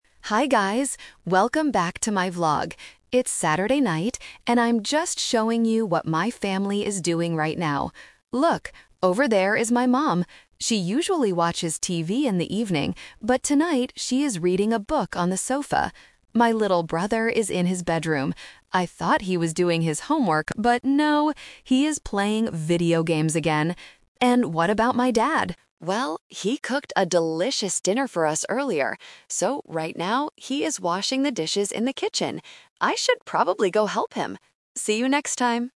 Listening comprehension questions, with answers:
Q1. What is the mother doing right now?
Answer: Reading a book.

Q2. What did the vlogger think his little brother was doing?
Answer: Doing his homework.

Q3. What is the dad doing in the kitchen?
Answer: Washing the dishes.

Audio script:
Welcome back to my vlog. It's Saturday night, and I'm just showing you what my family is doing right now. Look, over there is my mom. She usually watches TV in the evening, but tonight she is reading a book on the sofa. My little brother is in his bedroom. I thought he was doing his homework, but no, he is playing video games again! And what about my dad? Well, he cooked a delicious dinner for us earlier. So, right now, he is washing the dishes in the kitchen. I should probably go help him! See you next time!